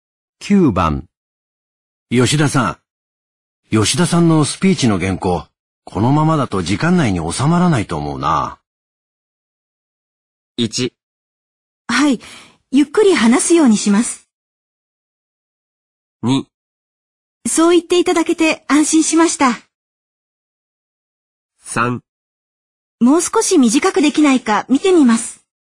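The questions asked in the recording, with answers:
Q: 吉田さんのスピーチの原稿、このままだと時間内に収まらないと思うな。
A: 3: もう少し短くできないか見てみます。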